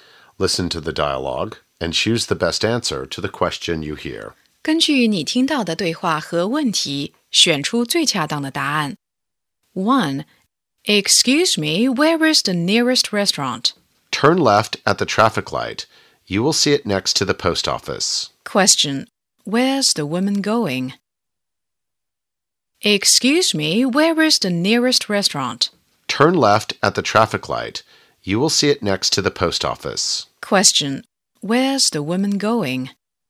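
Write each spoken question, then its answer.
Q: Where's the woman going?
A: The nearest restaurant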